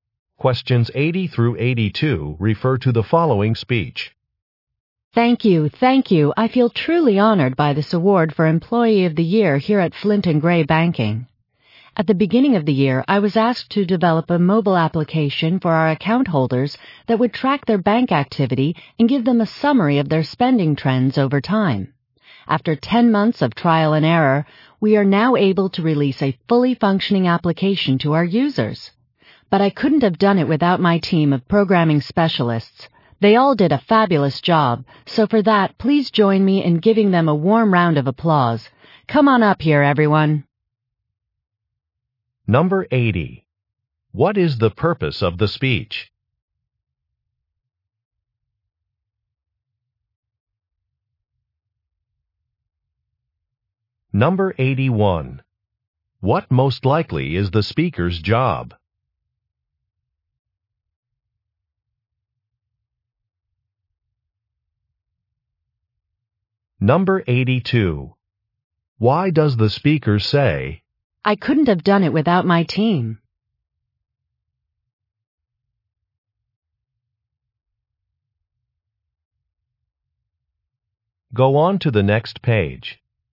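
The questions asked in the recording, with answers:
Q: What is the purpose of the speech?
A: To accept an Employee of the Year award

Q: What most likely is the speaker's job?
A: Software/application developer

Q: Why does the speaker say,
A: To give credit to her team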